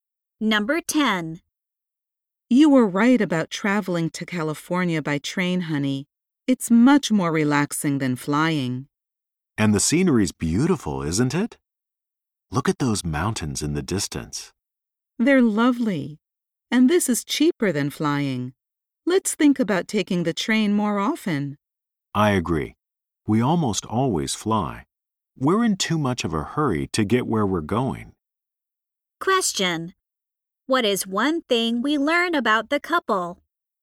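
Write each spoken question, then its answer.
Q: What is one thing we learn about the couple?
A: They almost always travel by plane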